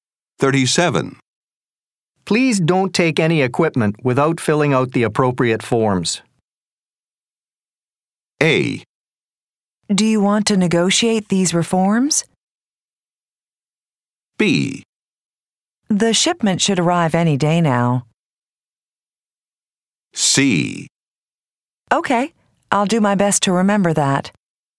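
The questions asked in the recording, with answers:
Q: Please don't take any equipment without filling out the appropriate forms.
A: C: Okay, I'll do my best to remember that.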